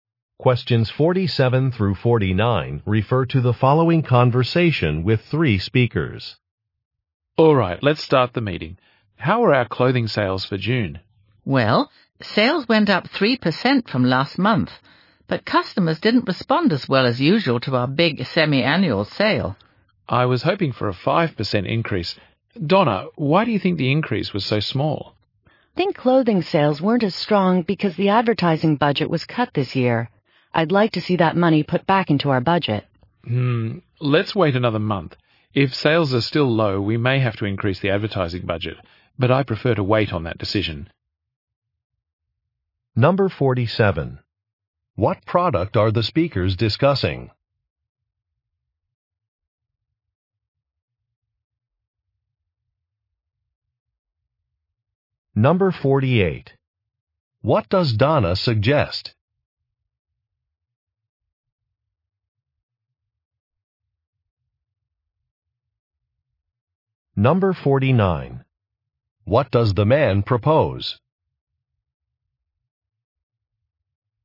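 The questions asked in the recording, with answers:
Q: What product are the speakers discussing?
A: Clothing

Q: What does Donna suggest?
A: Restoring the advertising budget

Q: What does the man propose?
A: Waiting another month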